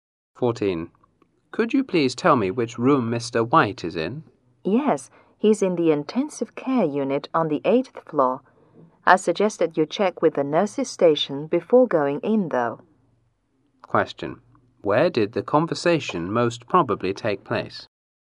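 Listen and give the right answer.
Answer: In a hospital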